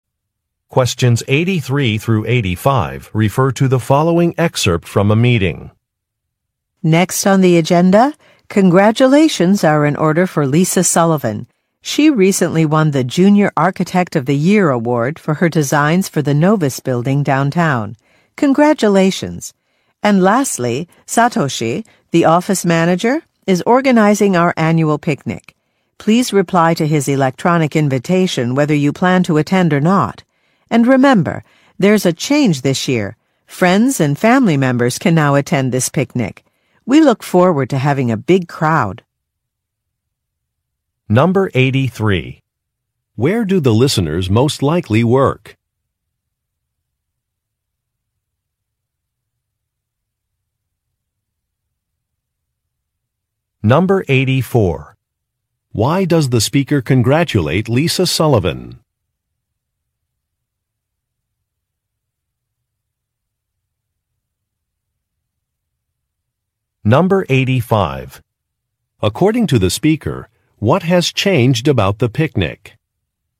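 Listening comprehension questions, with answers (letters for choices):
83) Where do the listeners most likely work?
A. At an architecture firm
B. At a law firm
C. At an accounting firm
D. At a bank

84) Why does the speaker congratulate Lisa Sullivan?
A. She won an award.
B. She was promoted.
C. She had an article published.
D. She recruited a client.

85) According to the speaker, what has changed about the picnic?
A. Live music will be provided.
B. Vegetarian options will be available.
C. Friends and family can be invited.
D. Employees can join a planning committee.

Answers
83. A
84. A
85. C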